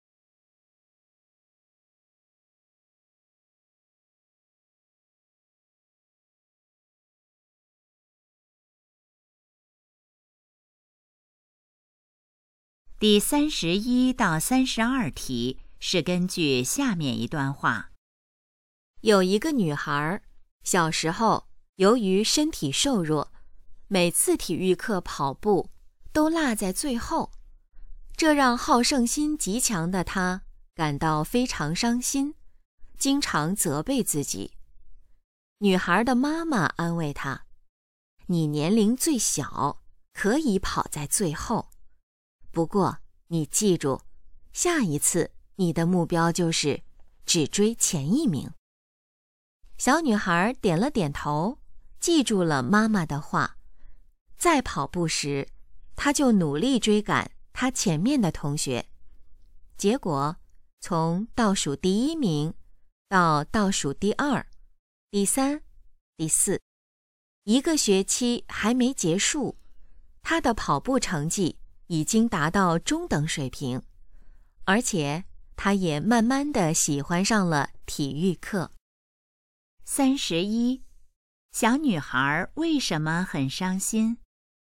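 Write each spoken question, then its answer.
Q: 小女孩为什么很伤心?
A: 跑步总落在最后

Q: 妈妈告诉她应该怎么办。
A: 下一次只追前一名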